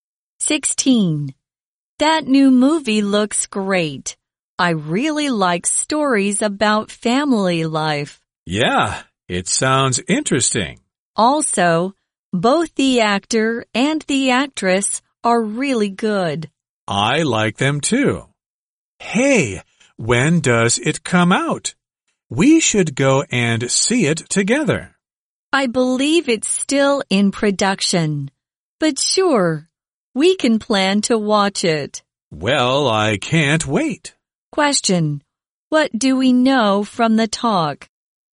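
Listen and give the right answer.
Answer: The movie hasn't come out yet; it's still in production.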